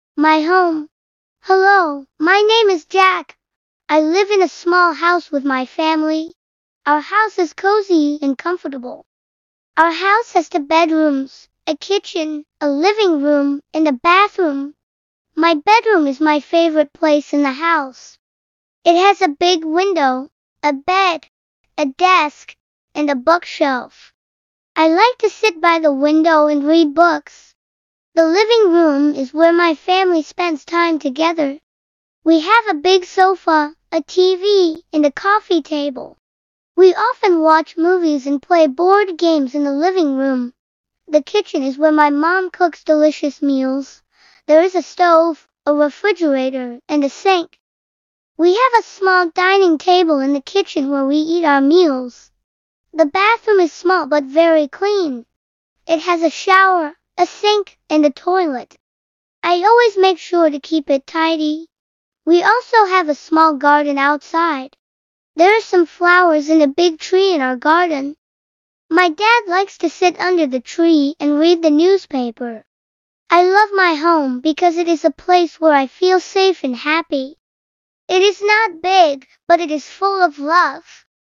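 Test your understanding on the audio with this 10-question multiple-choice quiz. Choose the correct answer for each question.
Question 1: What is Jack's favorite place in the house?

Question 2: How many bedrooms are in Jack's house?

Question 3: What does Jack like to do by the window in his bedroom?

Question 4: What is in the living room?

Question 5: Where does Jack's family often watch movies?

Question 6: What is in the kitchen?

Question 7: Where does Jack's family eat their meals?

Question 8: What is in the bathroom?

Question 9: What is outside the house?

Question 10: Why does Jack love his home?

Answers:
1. His bedroom
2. Two
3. Read books
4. A big sofa, a TV and a coffee table
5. In the living room
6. A stove, a refrigerator, a sink and a small dining table
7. At the small dining table in the kitchen
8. A shower, a sink and a toilet
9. A small garden with flowers and a big tree
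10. Because he feels safe and happy there

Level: Basic English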